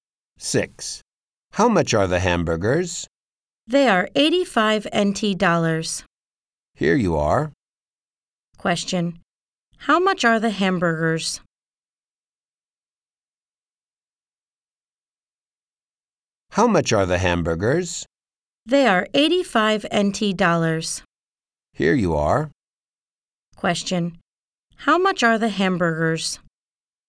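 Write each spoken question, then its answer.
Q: How much are the hamburgers?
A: 85 NT dollars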